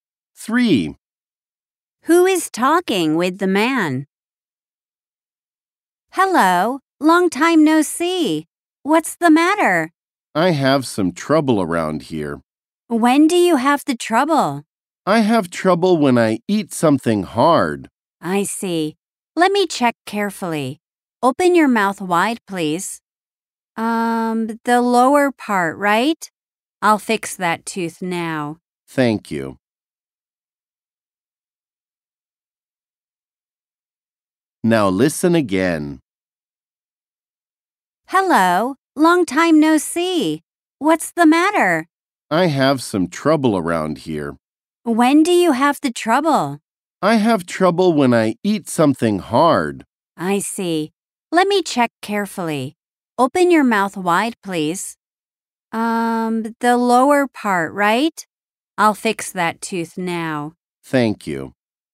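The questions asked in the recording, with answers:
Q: Who is talking with the man?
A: A dentist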